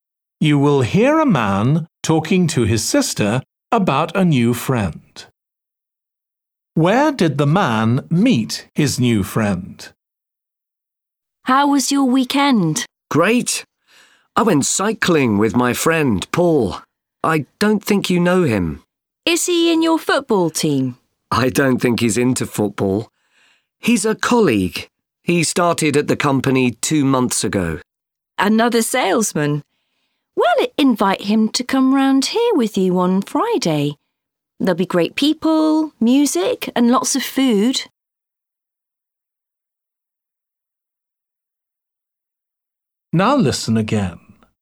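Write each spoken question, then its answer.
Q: Where did the man meet his new friend?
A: At work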